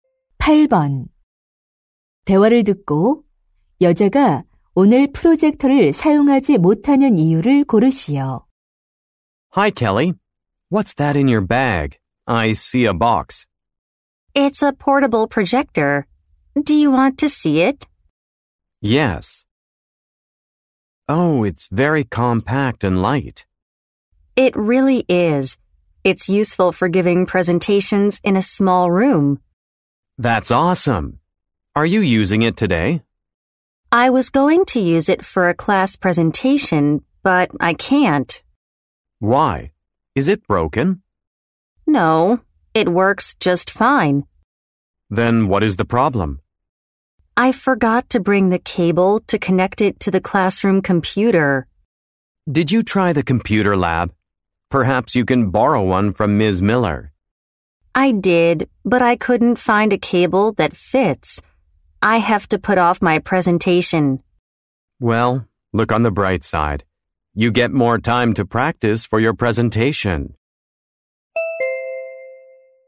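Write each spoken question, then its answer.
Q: 대화를 듣고 여자가 오늘 프로젝터를 사용하지 못하는 이유를 고르시오.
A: 교실 컴퓨터에 연결할 케이블을 가져오지 않아서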